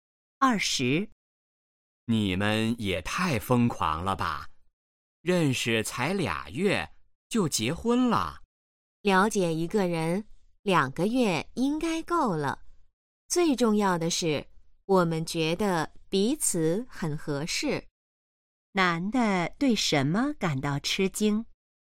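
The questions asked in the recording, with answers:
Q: 男的对什么感到吃惊?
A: 他们认识两个月就结婚了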